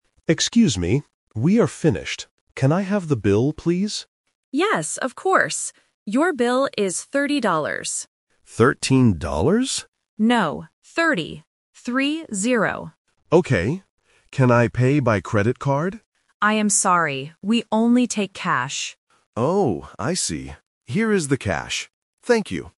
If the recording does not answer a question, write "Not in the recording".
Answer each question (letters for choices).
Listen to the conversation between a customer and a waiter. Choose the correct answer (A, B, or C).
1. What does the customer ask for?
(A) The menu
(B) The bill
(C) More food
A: B

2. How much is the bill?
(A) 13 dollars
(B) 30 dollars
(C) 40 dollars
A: B

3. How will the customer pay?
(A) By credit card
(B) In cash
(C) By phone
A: B

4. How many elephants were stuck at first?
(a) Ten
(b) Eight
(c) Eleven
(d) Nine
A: Not in the recording

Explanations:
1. The customer clearly says, "Can I have the bill, please?"
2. The waiter says the bill is 30 dollars, and spells out the numbers: "Three-zero".
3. The waiter says "We only take cash", and the customer agrees by saying "Here is the cash."